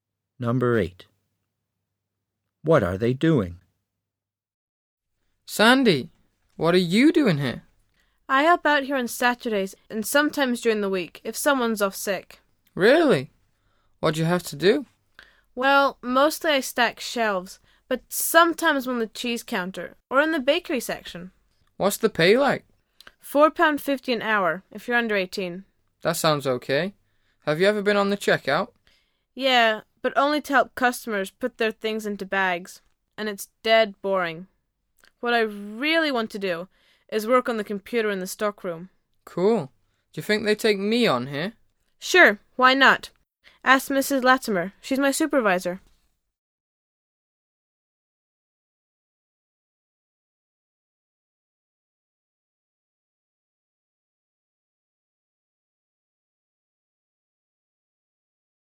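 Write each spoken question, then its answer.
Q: What are they doing?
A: Talking about a part-time job in a supermarket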